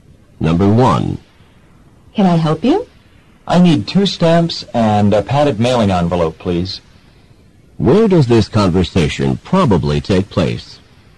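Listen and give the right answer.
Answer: At a post office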